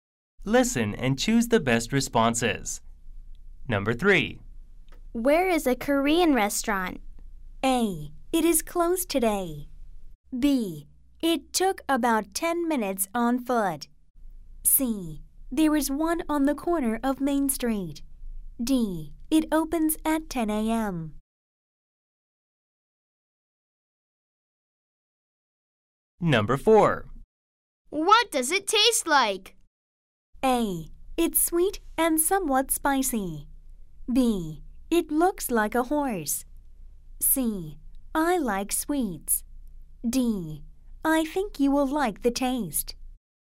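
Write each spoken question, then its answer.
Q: Where is a Korean restaurant?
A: C: There is one on the corner of Main Street.

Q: What does it taste like?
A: A: It's sweet and somewhat spicy.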